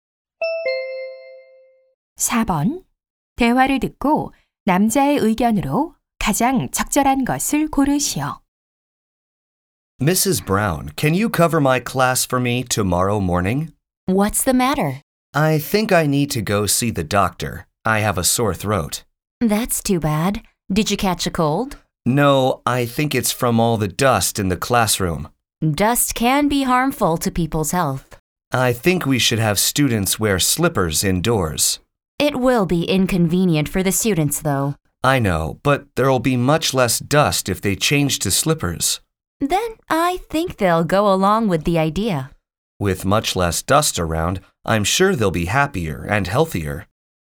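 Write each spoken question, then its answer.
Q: 대화를 듣고 남자의 의견으로 가장 적절한 것을 고르시오.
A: 교실 먼지를 줄이기 위해 학생들이 실내에서 실내화를 신어야 한다.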